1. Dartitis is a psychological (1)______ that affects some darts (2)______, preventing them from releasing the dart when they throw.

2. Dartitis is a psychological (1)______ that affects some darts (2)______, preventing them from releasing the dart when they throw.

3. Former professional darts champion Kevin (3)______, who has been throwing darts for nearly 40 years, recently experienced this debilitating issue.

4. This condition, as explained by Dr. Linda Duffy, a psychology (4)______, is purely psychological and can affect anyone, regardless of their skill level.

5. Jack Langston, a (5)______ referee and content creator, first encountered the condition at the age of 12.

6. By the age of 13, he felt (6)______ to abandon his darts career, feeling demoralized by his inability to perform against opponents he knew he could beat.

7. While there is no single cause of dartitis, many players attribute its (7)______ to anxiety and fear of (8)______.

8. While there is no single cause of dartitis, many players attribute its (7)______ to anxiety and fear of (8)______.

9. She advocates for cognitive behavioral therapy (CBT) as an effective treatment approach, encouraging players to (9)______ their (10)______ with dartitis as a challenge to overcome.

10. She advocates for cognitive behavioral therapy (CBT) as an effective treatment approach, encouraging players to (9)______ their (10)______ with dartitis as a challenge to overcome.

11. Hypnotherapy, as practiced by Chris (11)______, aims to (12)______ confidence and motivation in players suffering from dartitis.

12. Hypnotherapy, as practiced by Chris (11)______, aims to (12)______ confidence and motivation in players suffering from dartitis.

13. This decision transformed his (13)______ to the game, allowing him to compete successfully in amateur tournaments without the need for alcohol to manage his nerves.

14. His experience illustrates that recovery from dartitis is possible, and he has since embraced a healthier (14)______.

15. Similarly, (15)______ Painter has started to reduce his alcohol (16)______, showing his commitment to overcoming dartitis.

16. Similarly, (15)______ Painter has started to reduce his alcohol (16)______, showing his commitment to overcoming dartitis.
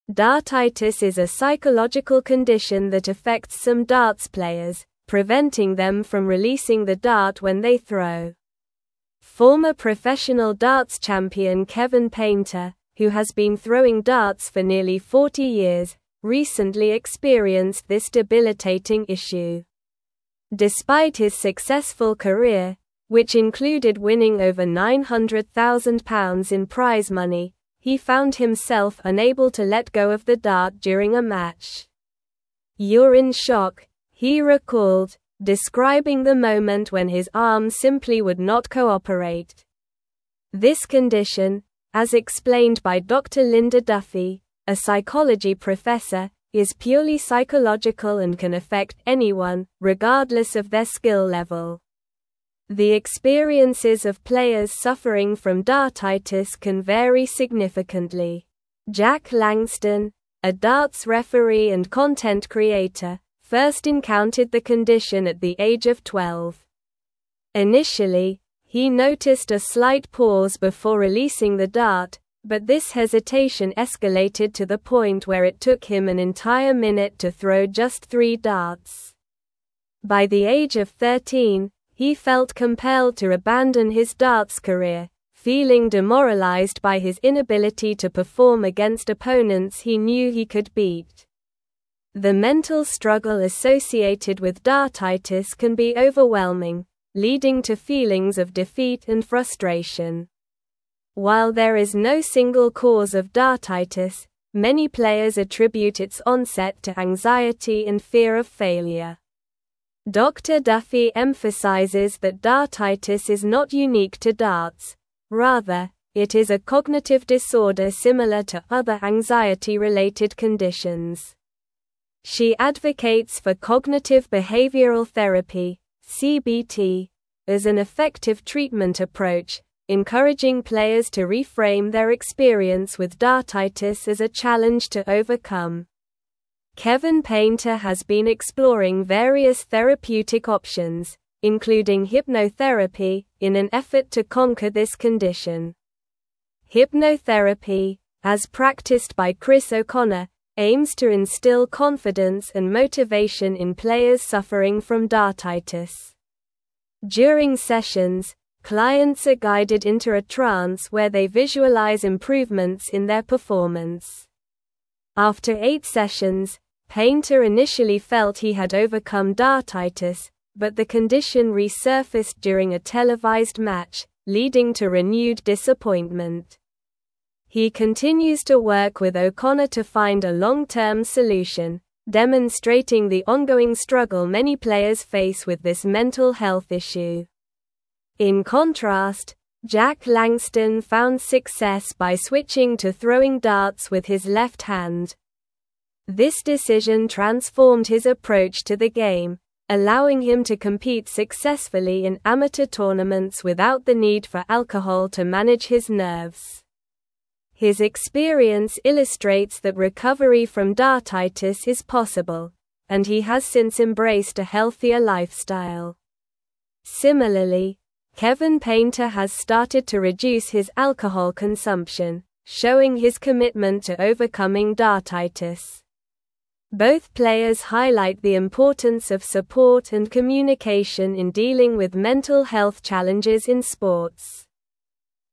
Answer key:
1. condition
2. players
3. Painter
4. professor
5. darts
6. compelled
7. onset
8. failure
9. reframe
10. experience
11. O'Connor
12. instill
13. approach
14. lifestyle
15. Kevin
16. consumption

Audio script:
Dartitis is a psychological condition that affects some darts players, preventing them from releasing the dart when they throw. Former professional darts champion Kevin Painter, who has been throwing darts for nearly 40 years, recently experienced this debilitating issue. Despite his successful career, which included winning over £900,000 in prize money, he found himself unable to let go of the dart during a match. "You're in shock," he recalled, describing the moment when his arm simply would not cooperate. This condition, as explained by Dr. Linda Duffy, a psychology professor, is purely psychological and can affect anyone, regardless of their skill level.
The experiences of players suffering from dartitis can vary significantly. Jack Langston, a darts referee and content creator, first encountered the condition at the age of 12. Initially, he noticed a slight pause before releasing the dart, but this hesitation escalated to the point where it took him an entire minute to throw just three darts. By the age of 13, he felt compelled to abandon his darts career, feeling demoralized by his inability to perform against opponents he knew he could beat. The mental struggle associated with dartitis can be overwhelming, leading to feelings of defeat and frustration.
While there is no single cause of dartitis, many players attribute its onset to anxiety and fear of failure. Dr. Duffy emphasizes that dartitis is not unique to darts; rather, it is a cognitive disorder similar to other anxiety-related conditions. She advocates for cognitive behavioral therapy (CBT) as an effective treatment approach, encouraging players to reframe their experience with dartitis as a challenge to overcome. Kevin Painter has been exploring various therapeutic options, including hypnotherapy, in an effort to conquer this condition.
Hypnotherapy, as practiced by Chris O'Connor, aims to instill confidence and motivation in players suffering from dartitis. During sessions, clients are guided into a trance where they visualize improvements in their performance. After eight sessions, Painter initially felt he had overcome dartitis, but the condition resurfaced during a televised match, leading to renewed disappointment. He continues to work with O'Connor to find a long-term solution, demonstrating the ongoing struggle many players face with this mental health issue.
In contrast, Jack Langston found success by switching to throwing darts with his left hand. This decision transformed his approach to the game, allowing him to compete successfully in amateur tournaments without the need for alcohol to manage his nerves. His experience illustrates that recovery from dartitis is possible, and he has since embraced a healthier lifestyle. Similarly, Kevin Painter has started to reduce his alcohol consumption, showing his commitment to overcoming dartitis. Both players highlight the importance of support and communication in dealing with mental health challenges in sports.

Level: Level 4